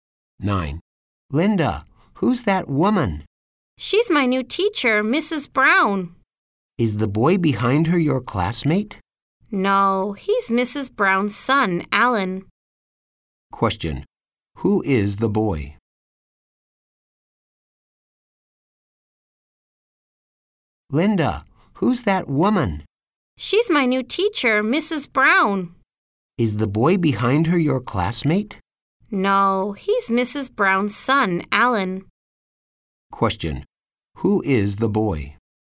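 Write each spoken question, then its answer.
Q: Who is the boy?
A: Mrs. Brown's son, Alan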